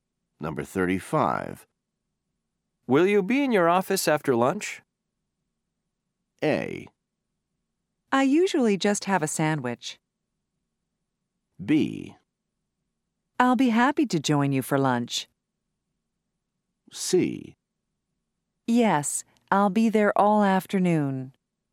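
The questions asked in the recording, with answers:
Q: Will you be in your office after lunch?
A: C: Yes, I'll be there all afternoon.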